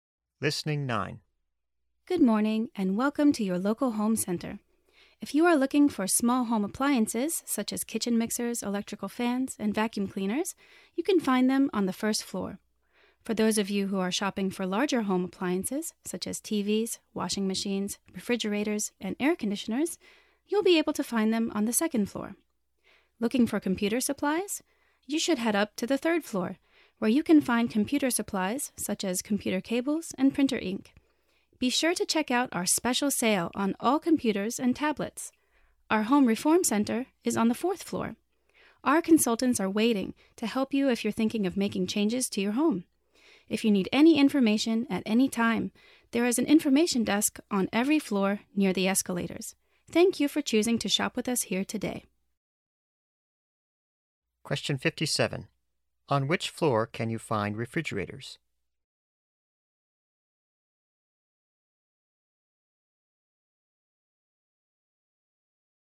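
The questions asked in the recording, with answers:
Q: On which floor can you find refrigerators?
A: The second floor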